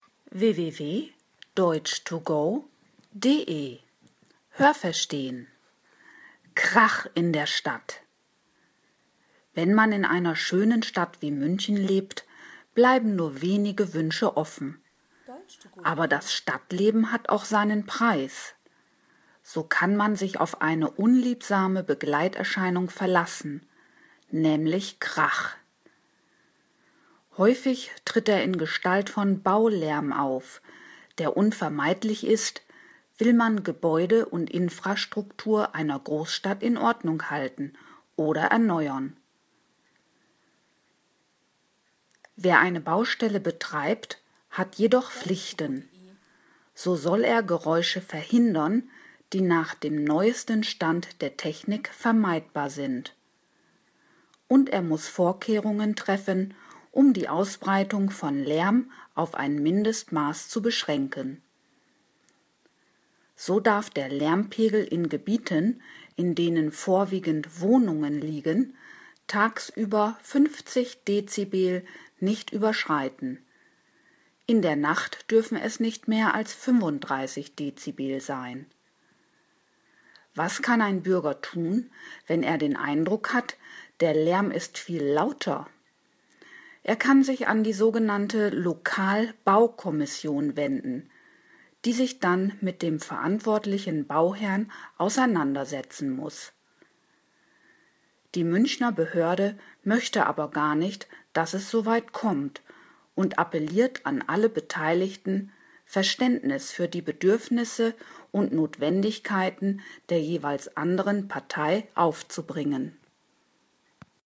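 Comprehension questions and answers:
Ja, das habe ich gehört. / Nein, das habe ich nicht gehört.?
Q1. Wenn man in einer Stadt wie München lebt, hat man viele Wünsche.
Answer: Nein, das habe ich nicht gehört.

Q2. Ein Tribut, den das Leben in der Stadt fordert, ist, dass man Lärm aushalten muss.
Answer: Ja, das habe ich gehört.

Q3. Die Instandhaltung und Renovierung von Bauwerken und städtischen Strukturen ist kaum vermeidbar mit hoher Geräuschentwicklung verbunden.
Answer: Ja, das habe ich gehört.

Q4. Betreiber einer Baustelle können uneingeschränkt handeln.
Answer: Nein, das habe ich nicht gehört.

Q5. Ein Bauherr muss Maßnahmen zur vollständigen Lärmunterdrückung treffen.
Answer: Nein, das habe ich nicht gehört.

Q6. In Wohngebieten darf der baubedingte Lärmpegel die 35-Dezibel-Marke niemals überschreiten.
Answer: Nein, das habe ich nicht gehört.

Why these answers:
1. Es bleiben nur wenige Wünsche offen. 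Die meisten Wünsche werden erfüllt.
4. Sie haben Pflichten (hier bezüglich der Lärmentwicklung).
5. Er muss dafür Sorge tragen, dass die Ausbreitung von Lärm auf ein Mindestmaß reduziert wird.

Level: C1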